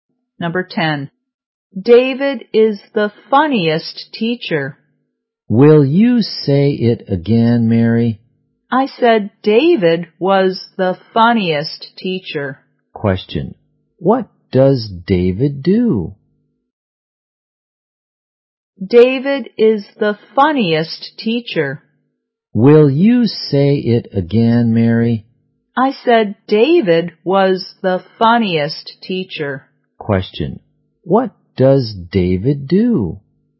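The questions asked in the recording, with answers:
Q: What does David do?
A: He is a teacher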